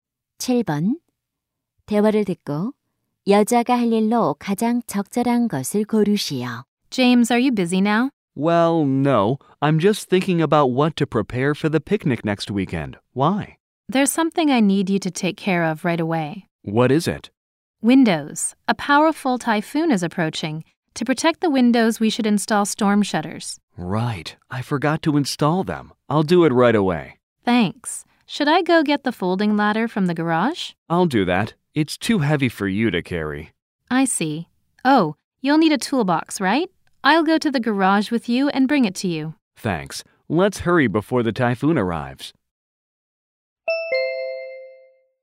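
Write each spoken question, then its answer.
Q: 대화를 듣고 여자가 할 일로 가장 적절한 것을 고르시오.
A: 공구 상자 가져오기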